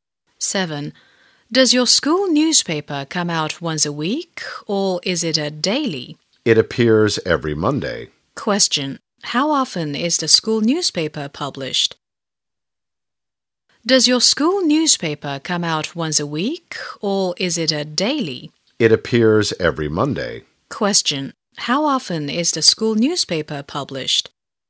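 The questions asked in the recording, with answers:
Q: How often is the school newspaper published?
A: Once a week (every Monday)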